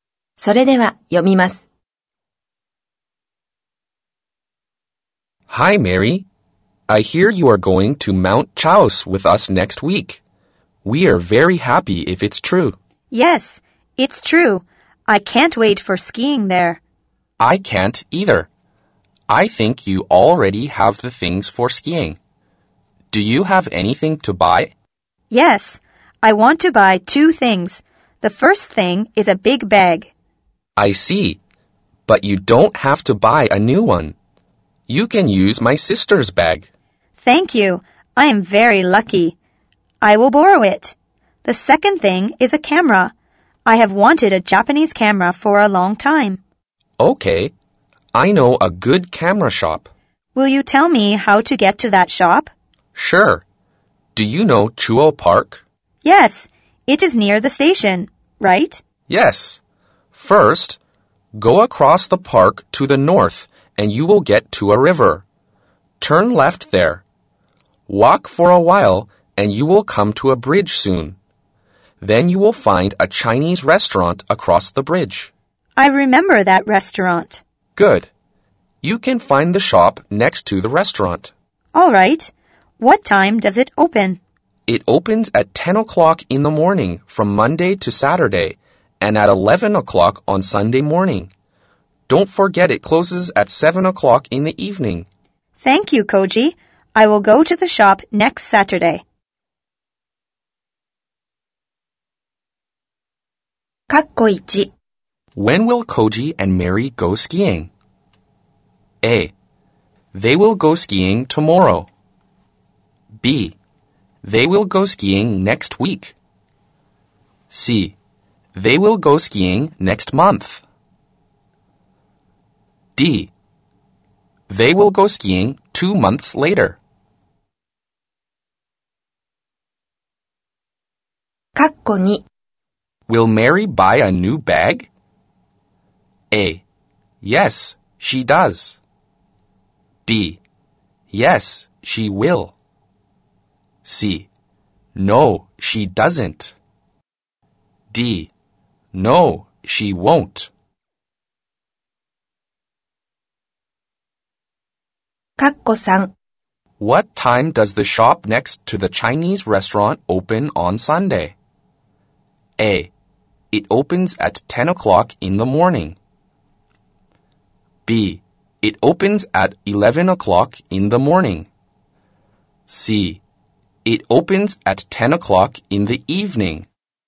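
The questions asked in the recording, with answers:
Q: When will Koji and Mary go skiing?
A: B: They will go skiing next week.

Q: Will Mary buy a new bag?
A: D: No, she won't.

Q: What time does the shop next to the Chinese restaurant open on Sunday?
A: B: It opens at 11 o'clock in the morning.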